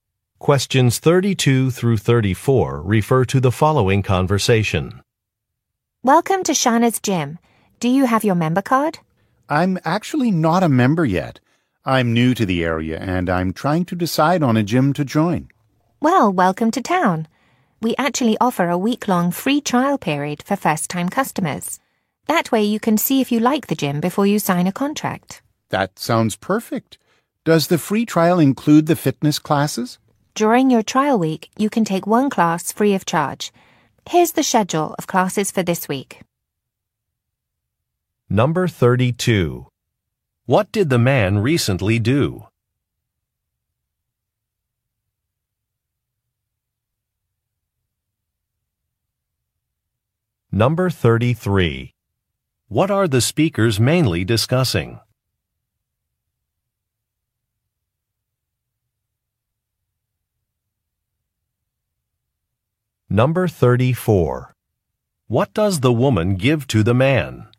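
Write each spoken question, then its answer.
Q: What did the man recently do?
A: He moved to the area.

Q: What are the speakers mainly discussing?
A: A free trial gym membership.

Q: What does the woman give to the man?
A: A schedule of fitness classes.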